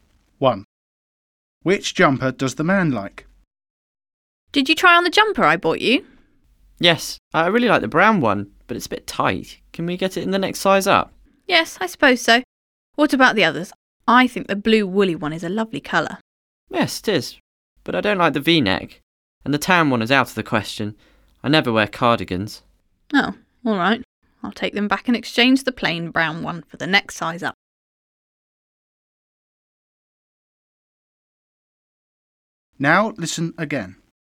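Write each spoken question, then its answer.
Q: Which jumper does the man like?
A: The plain brown one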